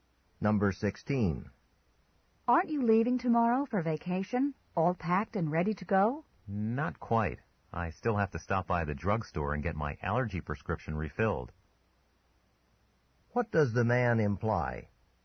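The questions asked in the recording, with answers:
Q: What does the man imply?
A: He still has to pick up his prescription before leaving.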